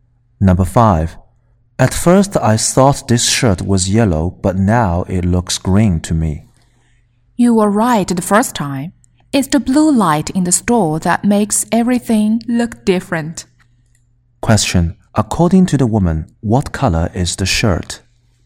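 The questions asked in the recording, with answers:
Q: According to the woman, what color is the shirt?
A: Yellow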